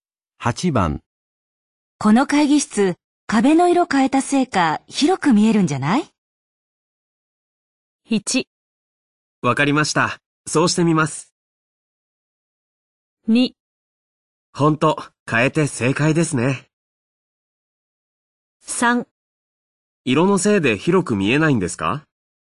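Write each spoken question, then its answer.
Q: この会議室、壁の色変えたせいか広く見えるんじゃない?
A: 2: ほんと、変えて正解ですね。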